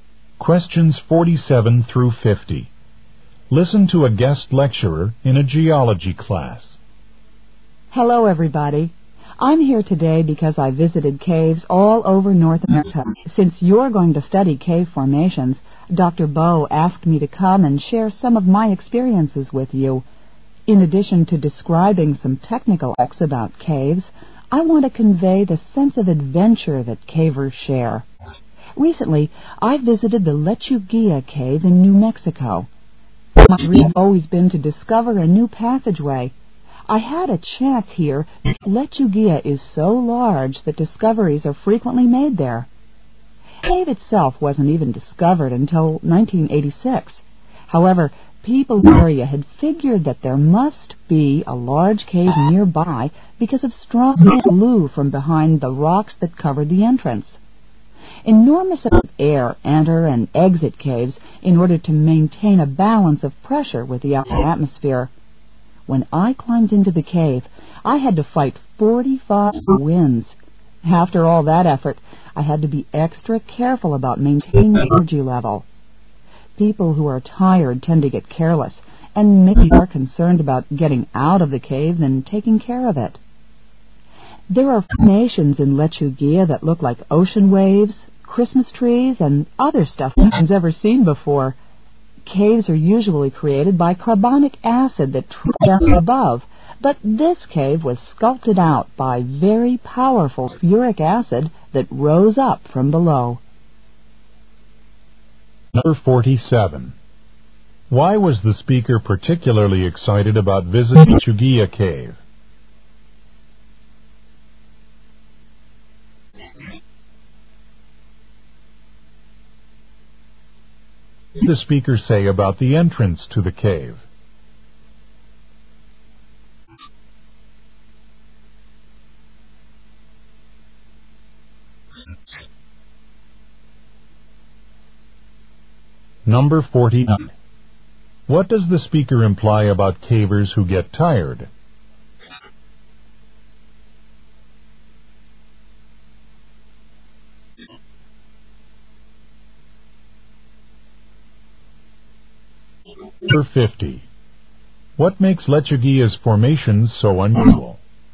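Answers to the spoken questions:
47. She might discover a new passageway.
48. Strong wind blew from behind the rocks covering it.
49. They may get careless and not take care of the cave.
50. Sulfuric acid rising from below formed them.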